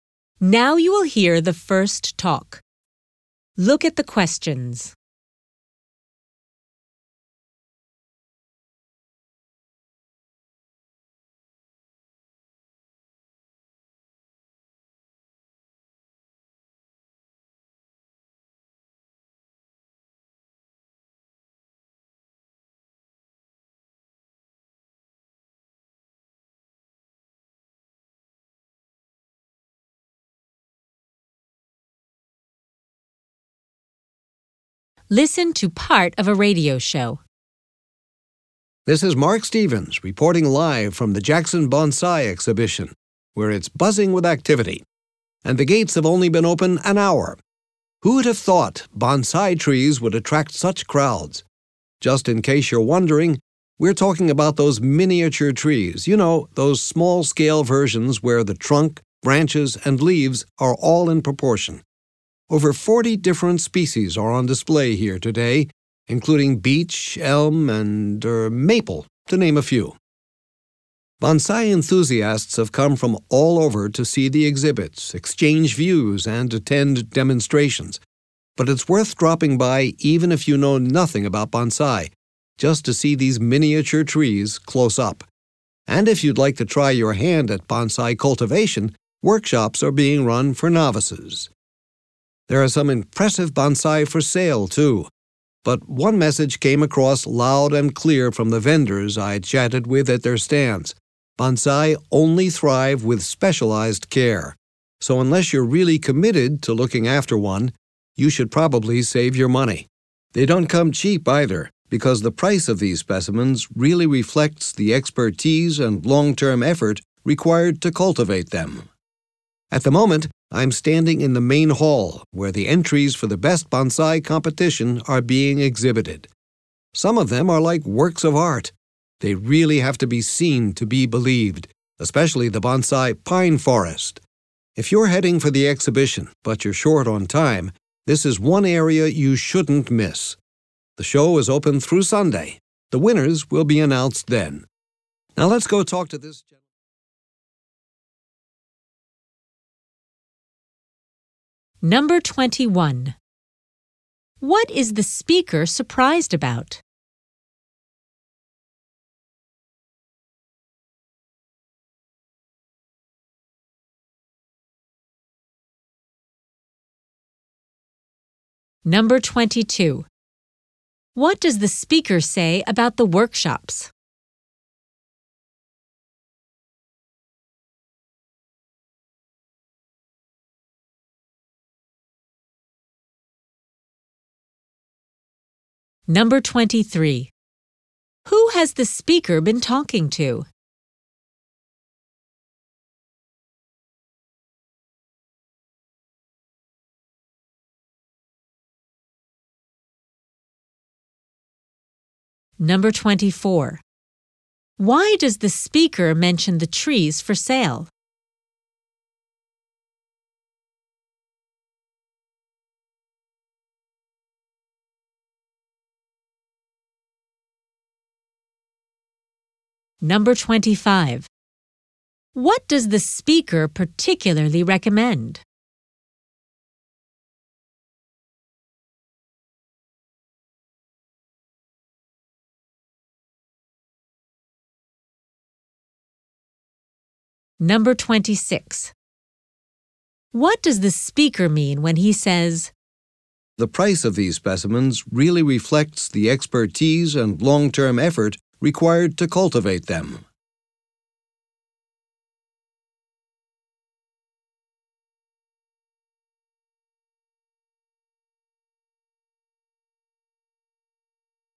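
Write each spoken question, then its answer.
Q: What is the speaker surprised about?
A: That bonsai trees attract such big crowds

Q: What does the speaker say about the workshops?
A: They are for beginners (novices)

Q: Who has the speaker been talking to?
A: Vendors at their stands

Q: What does the speaker particularly recommend?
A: Seeing the bonsai pine forest in the competition area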